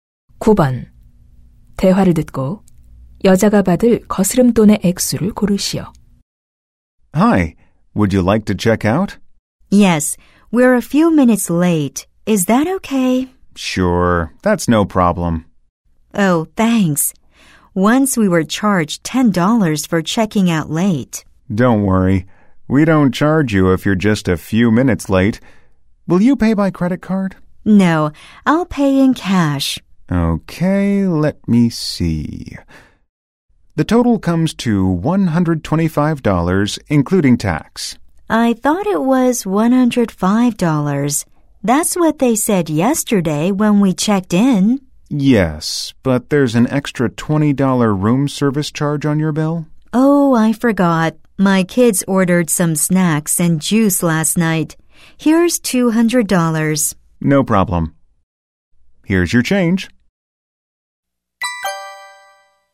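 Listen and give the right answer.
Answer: 75달러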